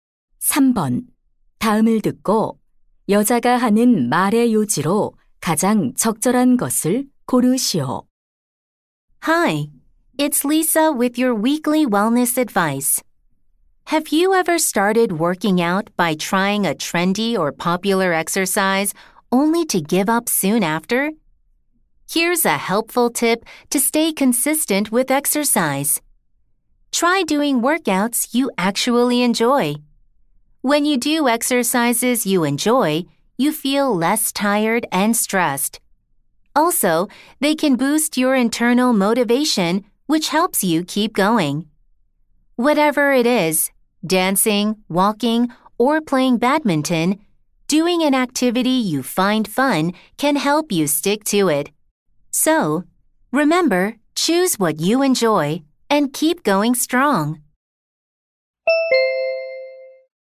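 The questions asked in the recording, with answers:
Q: 다음을 듣고 여자가 하는 말의 요지로 가장 적절한 것을 고르시오.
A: 꾸준히 운동하려면 즐기는 운동을 해야 한다.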